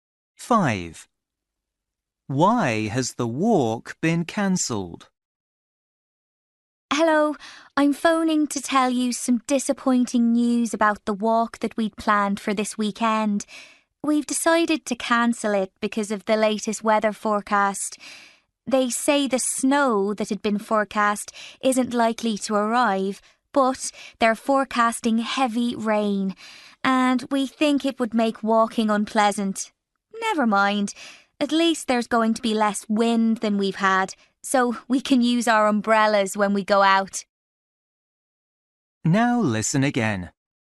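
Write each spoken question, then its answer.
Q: Why has the walk been cancelled?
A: Because of heavy rain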